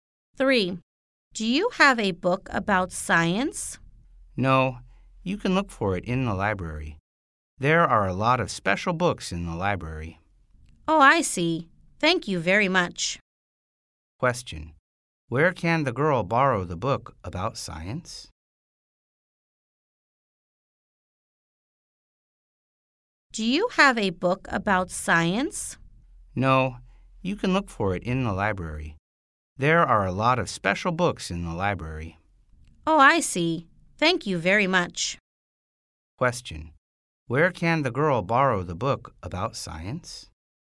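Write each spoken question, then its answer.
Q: Where can the girl borrow the book about science?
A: In the library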